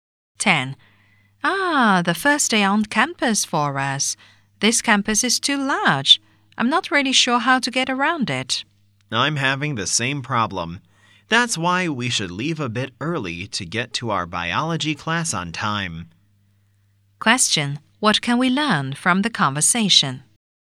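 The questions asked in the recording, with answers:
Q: What can we learn from the conversation?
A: They are new students who don't know their way around the campus.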